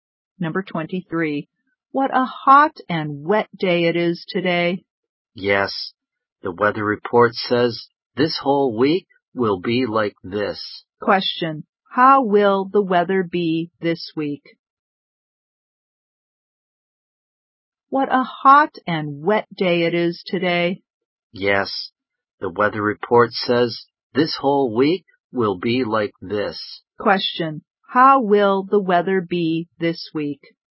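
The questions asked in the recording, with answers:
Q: How will the weather be this week?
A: Hot and wet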